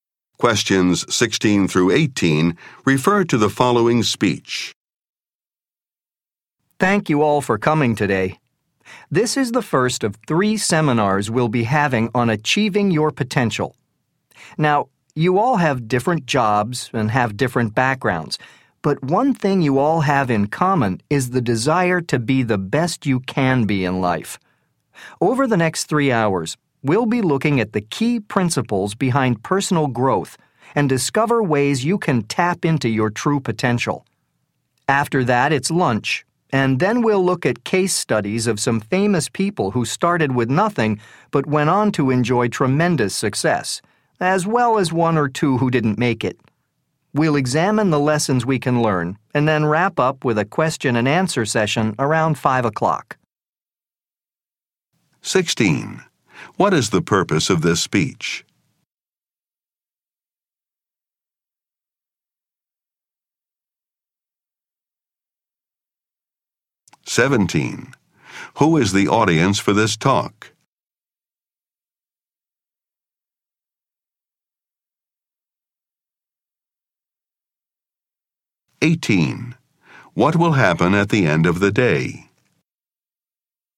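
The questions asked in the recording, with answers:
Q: What is the purpose of this speech?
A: To introduce a seminar on achieving your potential

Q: What will happen at the end of the day?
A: A question and answer session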